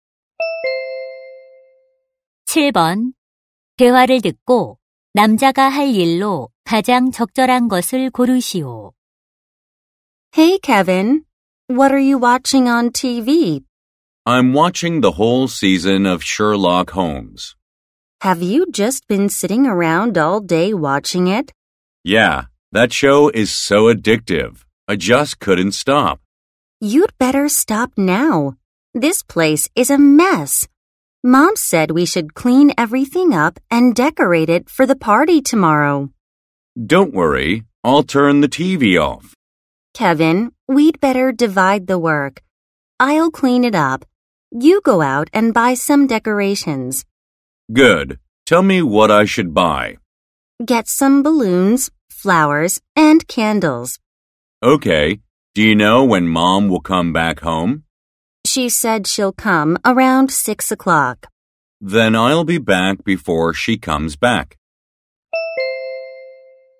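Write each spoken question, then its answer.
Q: 대화를 듣고 남자가 할 일로 가장 적절한 것을 고르시오.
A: 파티 장식품 사러 가기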